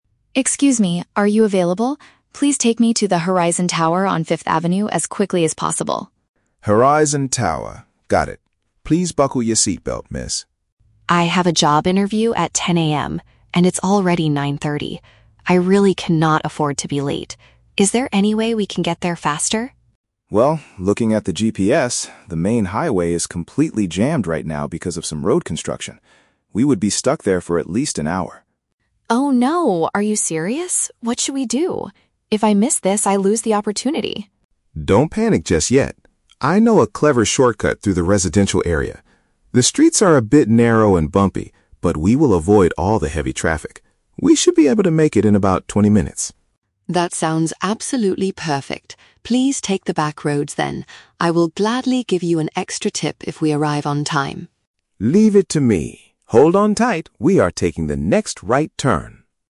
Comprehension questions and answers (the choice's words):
Listen to a conversation between a passenger and a taxi driver. Choose the best answer (A, B, or C) for each question.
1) Why is the passenger in such a hurry?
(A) She is running late for her daily work shift at Horizon Tower.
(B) She has an important meeting with a potential employer.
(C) She needs to catch a flight at ten o'clock in the morning.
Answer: She has an important meeting with a potential employer.

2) What is the current problem on the main road?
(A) Building work is causing a severe traffic jam.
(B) A major car accident has completely blocked the street.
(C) There are too many taxis waiting in line at the traffic lights.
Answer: Building work is causing a severe traffic jam.

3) How does the driver plan to solve the problem?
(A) By speeding up and driving aggressively on the highway.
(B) By dropping the passenger off at a nearby train station.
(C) By driving through local neighborhoods instead.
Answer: By driving through local neighborhoods instead.

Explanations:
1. The passenger says, "I have a job interview at 10:00 AM" and cannot afford to be late. Paraphrasing: job interview = important meeting with a potential employer.
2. The driver mentions that the main highway is "completely jammed right now because of some road construction." Paraphrasing: road construction = building work; completely jammed = causing a severe traffic jam.
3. The driver suggests taking a "shortcut through the residential area" and the passenger agrees to take the "back roads." Paraphrasing: residential area / back roads = local neighborhoods.

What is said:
Passenger: Excuse me, are you available? Please take me to the Horizon Tower on 5th Avenue as quickly as possible!
Driver: Horizon Tower, got it. Please buckle your seatbelt, Miss.
Passenger: I have a job interview at 10:00 AM, and it's already 9:30. I really cannot afford to be late. Is there any way we can get there faster?
Driver: Well, looking at the GPS, the main highway is completely jammed right now because of some road construction. We would be stuck there for at least an hour.
Passenger: Oh no, are you serious? What should we do? If I miss this, I lose the opportunity!
Driver: Don't panic just yet. I know a clever shortcut through the residential area. The streets are a bit narrow and bumpy, but we will avoid all the heavy traffic. We should be able to make it in about twenty minutes.
Passenger: That sounds absolutely perfect. Please take the back roads, then. I will gladly give you an extra tip if we arrive on time!